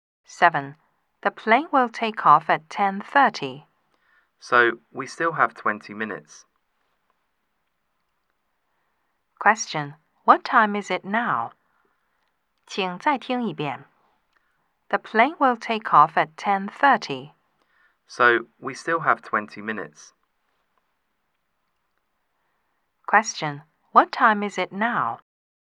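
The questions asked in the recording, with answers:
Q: Question, what time is it now?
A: 10:10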